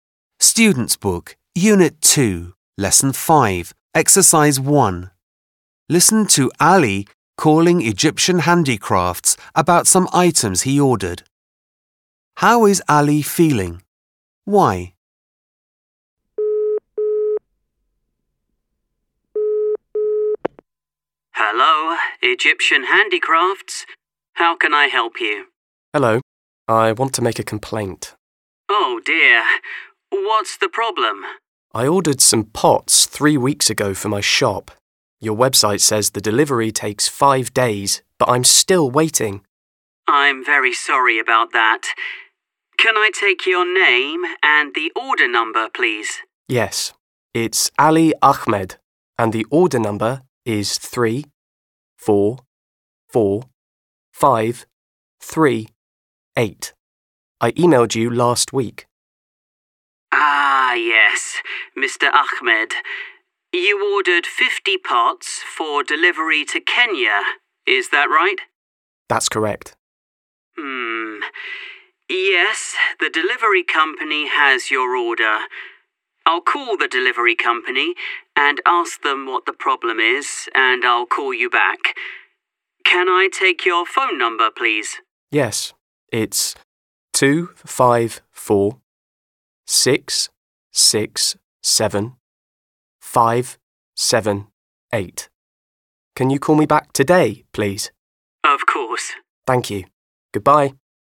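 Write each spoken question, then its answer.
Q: How is Ali feeling? Why?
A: Unhappy, because he ordered pots 3 weeks ago and they still haven't arrived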